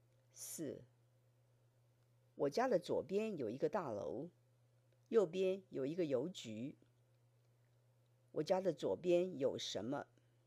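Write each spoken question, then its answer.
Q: 我家的左边有什么?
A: 一个大楼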